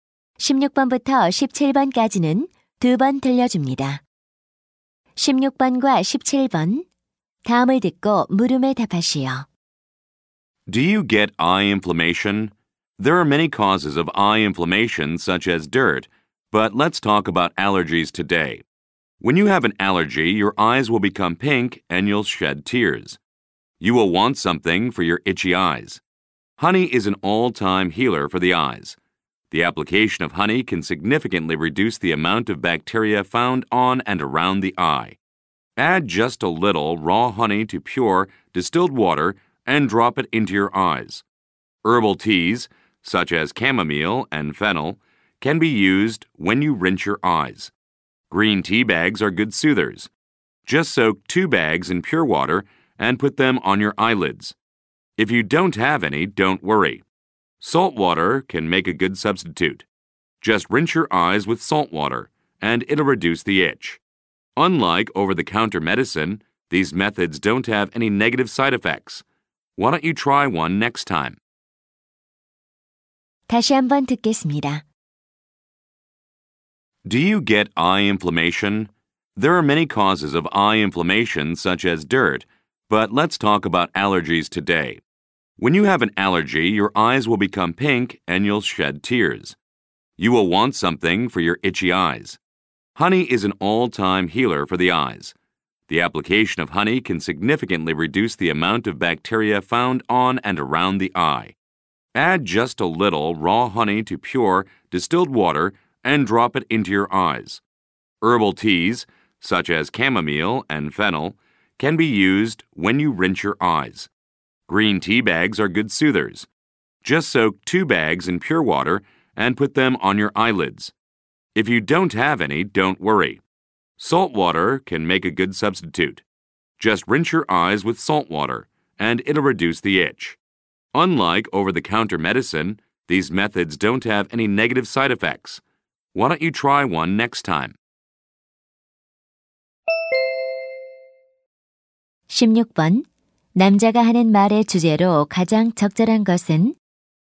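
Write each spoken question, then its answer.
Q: 남자가 하는 말의 주제로 가장 적절한 것은?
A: 알레르기성 눈 염증을 치료하는 자연 요법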